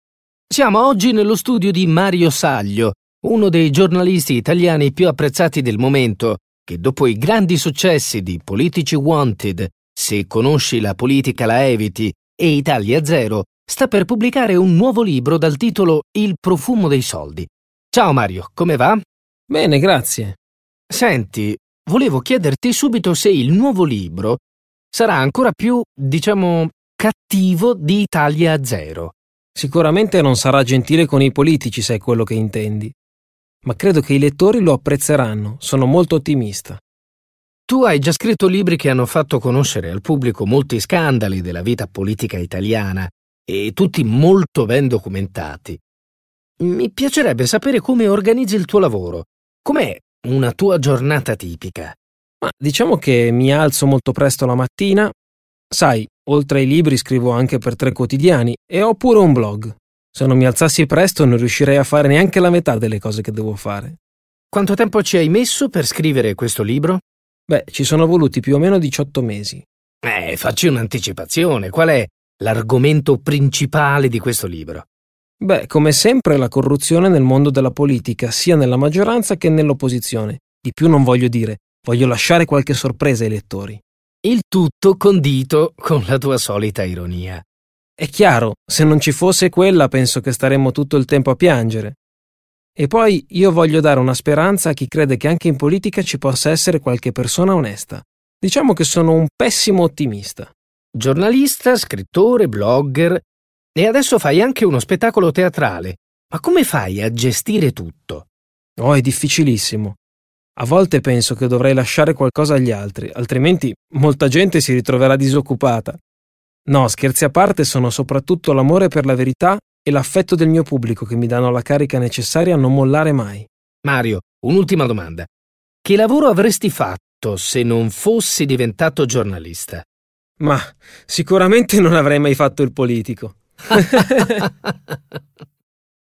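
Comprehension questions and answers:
Ascolta l'audio e rispondi alle domande. [Listen to the audio file and answer the following questions].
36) Mario Saglio scrive in modo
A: ironico

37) I suoi libri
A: parlano di scandali politici e sono ben documentati

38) Lui di solito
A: si alza molto presto la mattina

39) Saglio crede che l'ironia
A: sia necessaria, altrimenti staremmo tutto il tempo a piangere

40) Saglio è motivato da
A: l'amore per la verità e l'affetto del pubblico

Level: CEFR levels : A1.1 - A1.5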